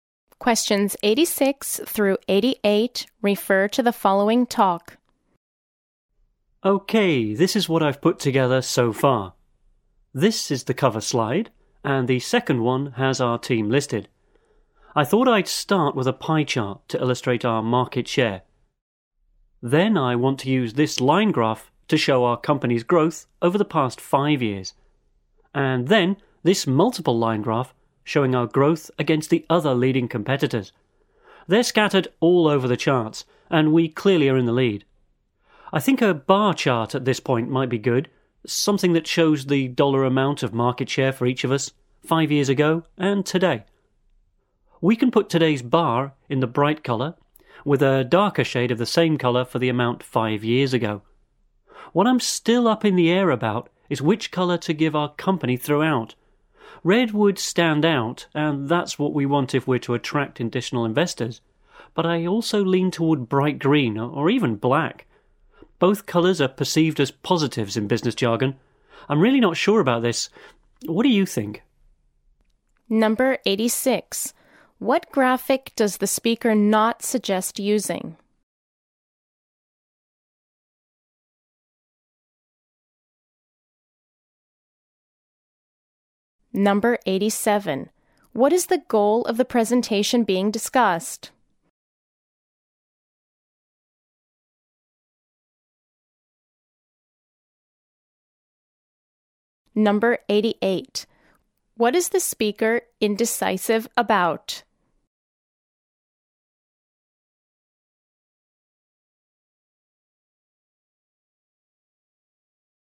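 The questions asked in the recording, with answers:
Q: What is the goal of the presentation being discussed?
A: To attract additional investors

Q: What is the speaker indecisive about?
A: Which colour to give the company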